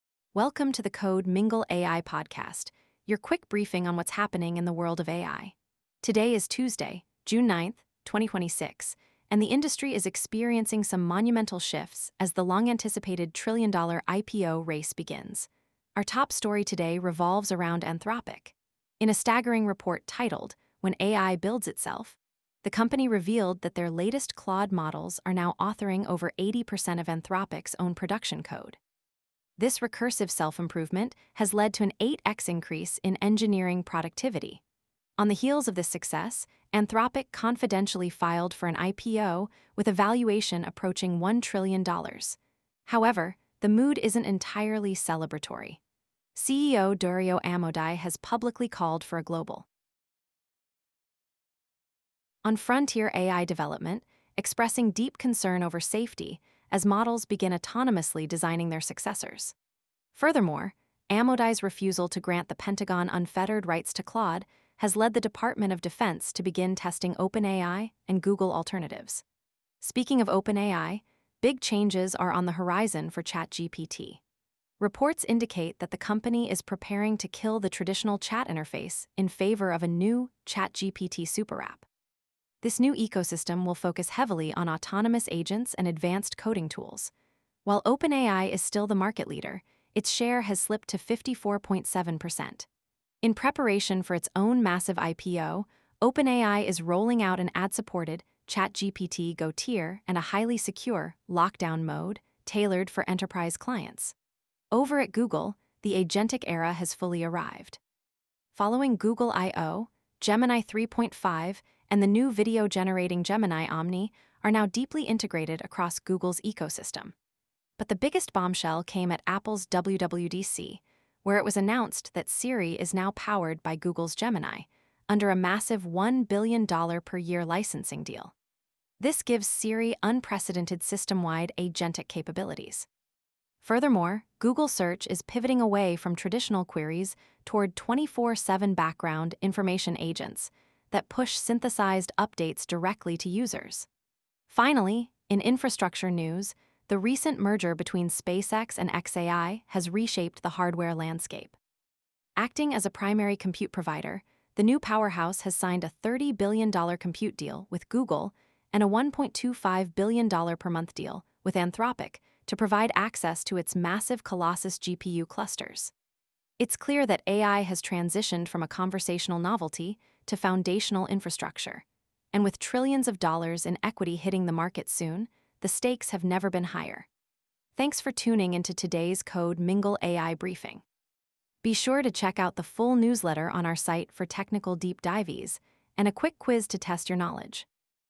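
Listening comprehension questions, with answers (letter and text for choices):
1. What percentage of Anthropic's production code is now authored by Claude, according to their recent report?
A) Over 50%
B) Over 80%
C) Exactly 100%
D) Around 30%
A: B) Over 80%

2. Which tech company recently signed a $1 billion/year licensing deal to power Apple's Siri?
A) OpenAI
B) Anthropic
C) Google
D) Microsoft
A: C) Google

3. OpenAI is reportedly preparing to phase out its traditional chat interface in favor of what new ecosystem?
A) ChatGPT Superapp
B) Codex Prime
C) OpenAI OS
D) GPT-Agent Cloud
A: A) ChatGPT Superapp

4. What major infrastructure provider signed a $30 billion compute deal with Google and a $1.25 billion/month deal with Anthropic?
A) AWS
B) SpaceX (merged with xAI)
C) NVIDIA Data Centers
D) Azure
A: B) SpaceX (merged with xAI)

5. What new feature is Google Search introducing to replace the traditional reactive query-and-click model?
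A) Quantum Search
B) Proactive RAG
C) Background Information Agents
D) Gemini Deep Search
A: C) Background Information Agents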